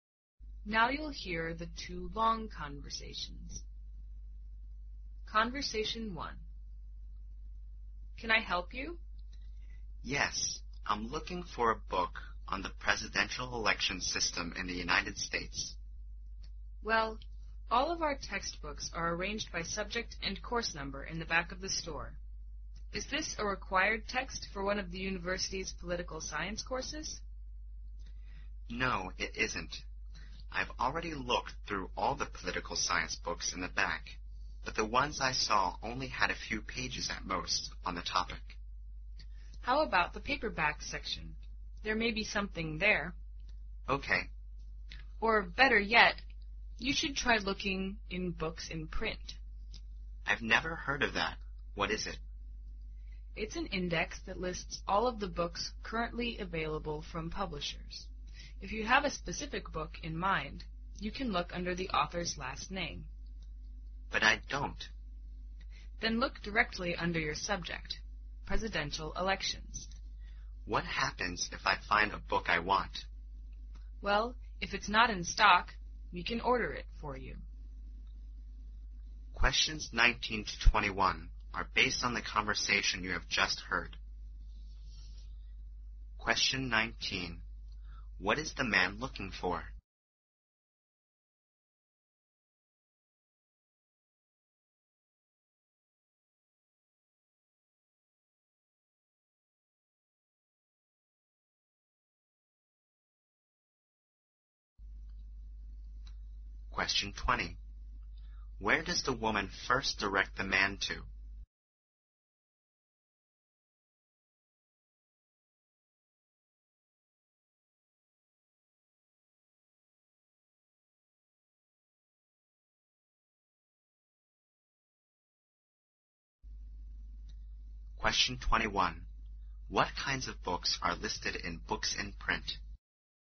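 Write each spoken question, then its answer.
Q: What is the man looking for?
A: A book on the presidential election system in the United States.

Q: Where does the woman first direct the man to?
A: The textbooks in the back of the store.

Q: What kinds of books are listed in books in print?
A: All books currently available from publishers.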